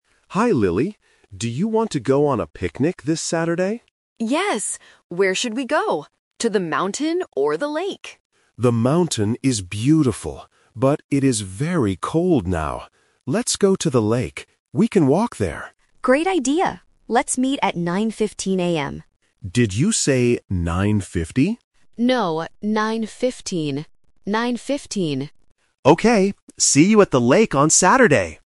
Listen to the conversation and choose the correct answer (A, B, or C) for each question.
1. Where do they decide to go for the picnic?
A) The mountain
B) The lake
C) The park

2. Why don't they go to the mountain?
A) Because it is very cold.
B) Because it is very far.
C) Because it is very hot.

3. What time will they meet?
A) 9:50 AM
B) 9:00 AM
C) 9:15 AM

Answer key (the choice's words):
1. The lake
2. Because it is very cold.
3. 9:15 AM

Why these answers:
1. The man says "Let's go to the lake." and the woman agrees with "Great idea!". Option (A) is a trap: the mountain is mentioned, but they reject it. Option (C) is not mentioned at all.
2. The man clearly states: "The mountain is beautiful, but it is very cold now." Option (B) and (C) are not mentioned in the audio.
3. The woman confirms the time is "9:15. Nine fifteen." Option (A) 9:50 is a trap because the man mishears the time and asks "Did you say 9:50?", but the woman says "No". Option (B) is not mentioned.

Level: A1